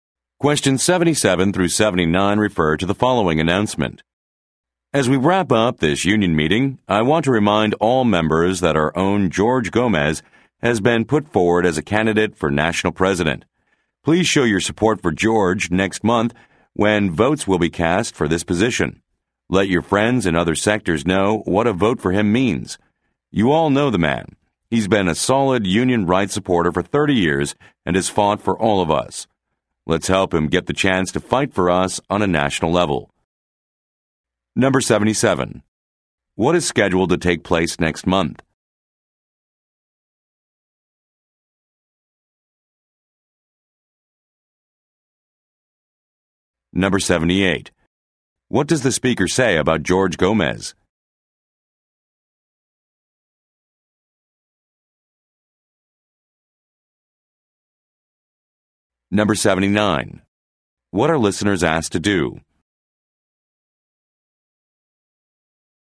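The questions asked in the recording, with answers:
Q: What is scheduled to take place next month?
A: A vote for national union president

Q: What does the speaker say about George Gomez?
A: He has supported union rights for 30 years

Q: What are listeners asked to do?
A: Support and vote for George and tell friends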